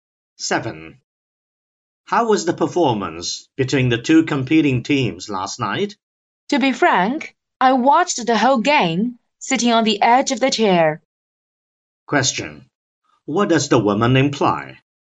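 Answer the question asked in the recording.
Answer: The game was very exciting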